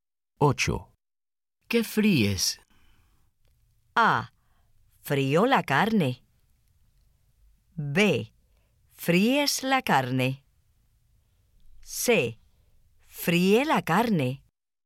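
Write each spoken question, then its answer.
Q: ¿Qué fríes?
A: A: Frío la carne.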